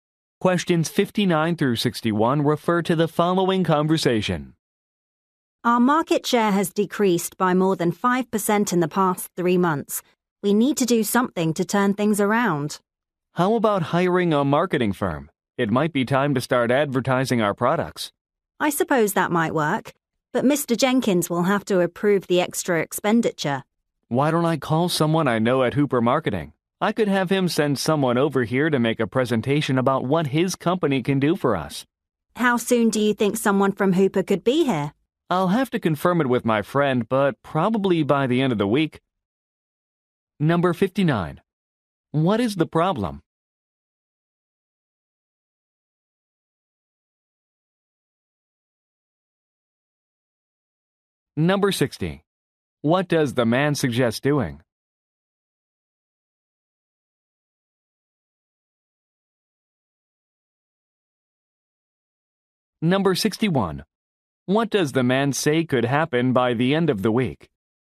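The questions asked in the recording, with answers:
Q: What is the problem?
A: Market share has decreased

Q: What does the man suggest doing?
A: Hiring a marketing firm

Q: What does the man say could happen by the end of the week?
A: Someone from Hooper Marketing could make a presentation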